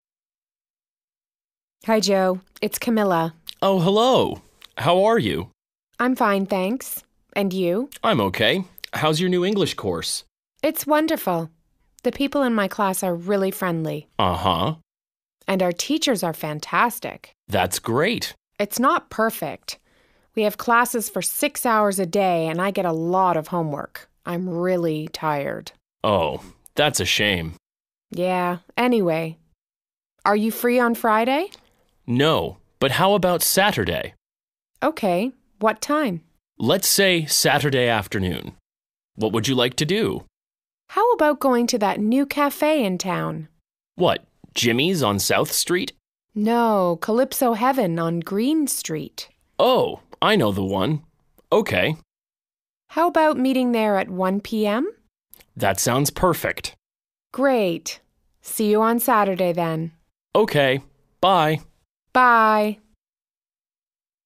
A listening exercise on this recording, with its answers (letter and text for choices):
2. Listen and underline the correct answer, a), b) or c).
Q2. Camilla says that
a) the classroom is beautiful.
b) the teachers are terrible.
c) the other students are friendly.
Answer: c) the other students are friendly.

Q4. Joe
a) is free on Friday.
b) wants to meet on Saturday.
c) isn't free on Sunday.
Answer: b) wants to meet on Saturday.

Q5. Camilla and Joe plan to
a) go to the movies.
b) have dinner in a restaurant.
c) meet for coffee.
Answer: c) meet for coffee.

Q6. Jimmy's is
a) beside Calypso Heaven.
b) on Green Street.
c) on South Street.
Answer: c) on South Street.

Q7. Camilla and Joe plan to meet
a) in the evening.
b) on Saturday morning.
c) at one o'clock in the afternoon.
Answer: c) at one o'clock in the afternoon.